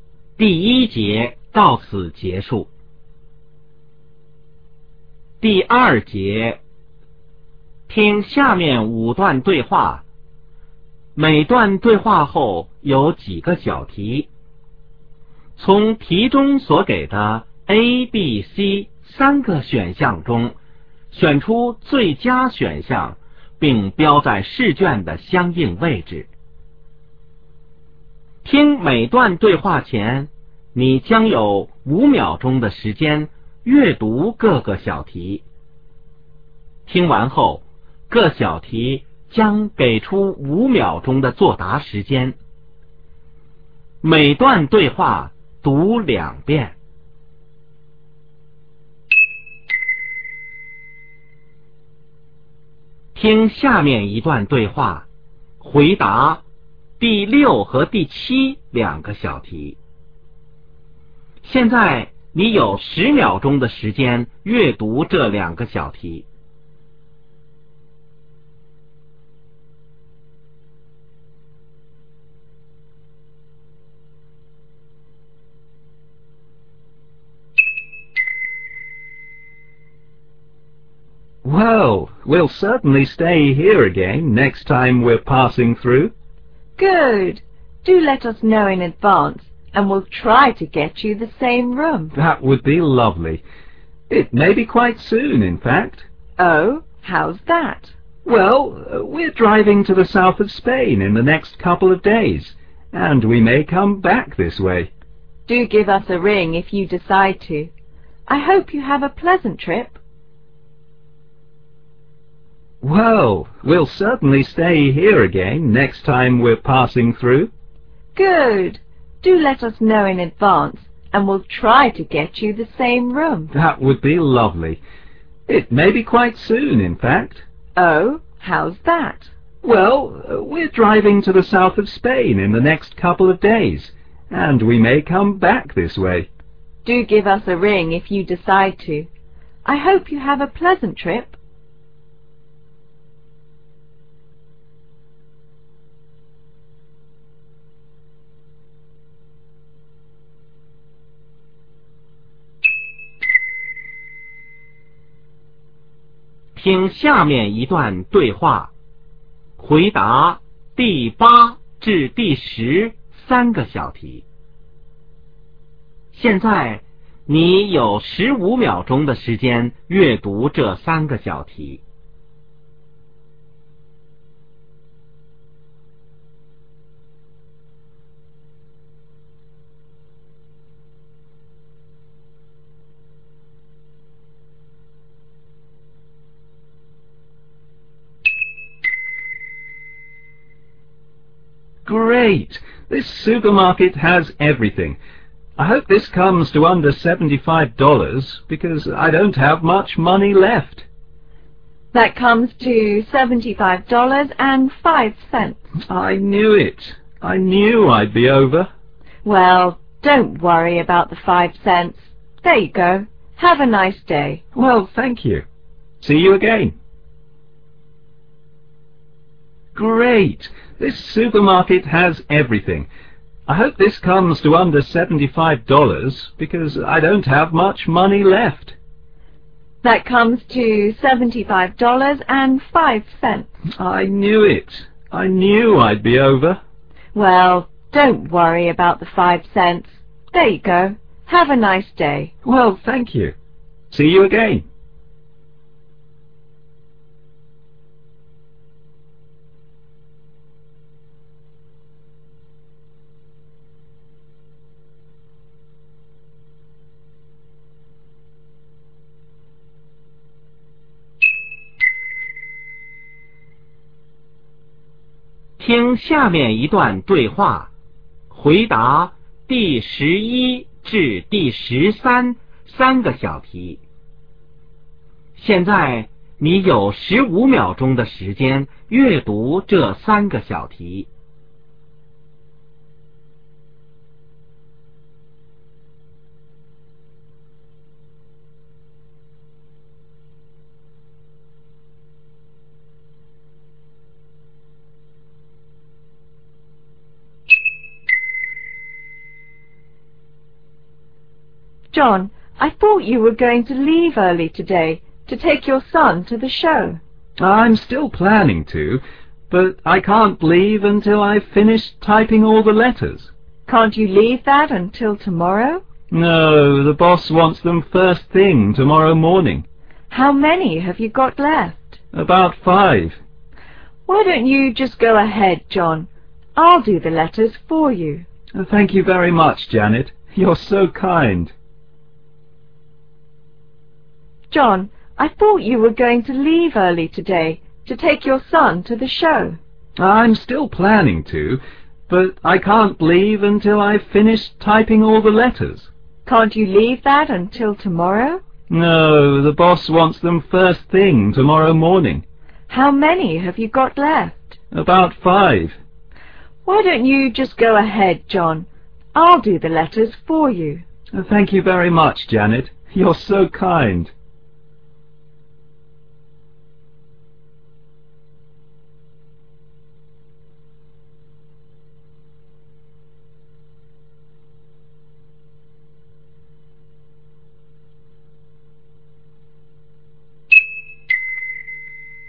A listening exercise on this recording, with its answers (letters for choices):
听下面5段对话。每段对话后有几个小题,从题中所给的A、B、C三个选项中选出最佳选项,并标在试卷的相应位置。听每段对话前,你将有时间阅读各个小题,每小题5秒钟;听完后,各小题将给出5秒钟的作答时间。每段对话读两遍。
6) Where does the conversation take place?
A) In a hotel.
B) At a booking office.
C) At a friend's house.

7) What will the man probably do in a few days?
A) Fly to another country.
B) Come to the same hotel.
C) Drive here to visit friends.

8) What did the man worry about at the beginning of the conversation?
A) He might not find everything he wanted.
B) He might not have enough money with him.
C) He might not be able to carry the shopping.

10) What did the woman do in the end?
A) She charged the man a little less.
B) She asked the man to pay her later.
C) She made a mistake in adding up the cost.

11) Where are the speakers?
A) In a classroom.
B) In a theatre.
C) In an office.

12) Why does the man plan to leave early?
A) He is going on vacation.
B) He is going to a performance.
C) He is going to the post office.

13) What does the woman offer to do?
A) Clean the office.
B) Pick up the man's son.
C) Finish the man's work.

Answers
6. A
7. B
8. B
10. A
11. C
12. B
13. C